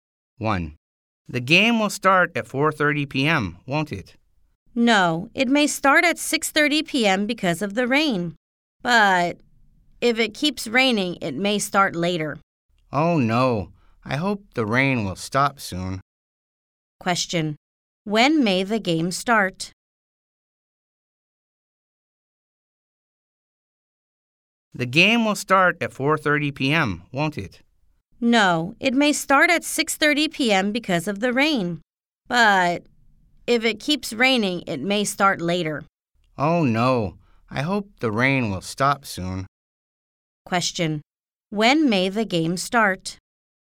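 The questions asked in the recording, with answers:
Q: when may the game start?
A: At 6:30 p.m. or later, because of the rain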